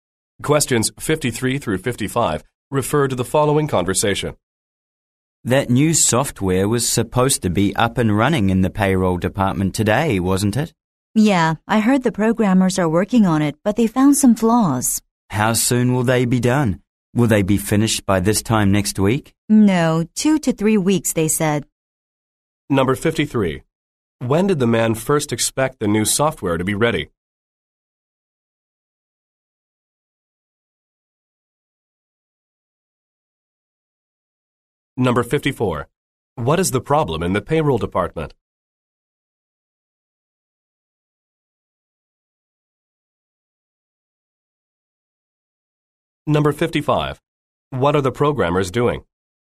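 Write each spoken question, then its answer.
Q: When did the man first expect the new software to be ready?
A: Today

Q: What is the problem in the payroll department?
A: The new software has flaws and isn't running yet

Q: What are the programmers doing?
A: Fixing flaws in the software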